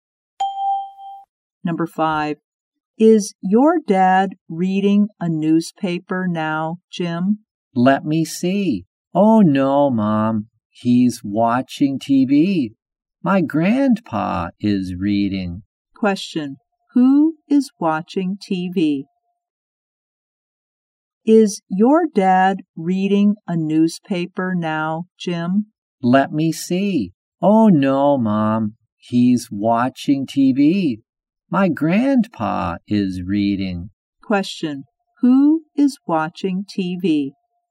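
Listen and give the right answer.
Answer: Jim's dad.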